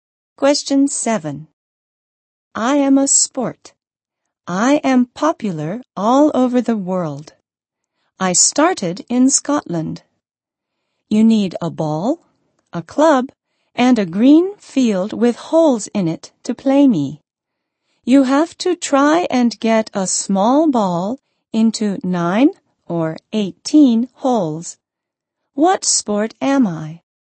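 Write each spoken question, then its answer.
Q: What sport am I?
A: Golf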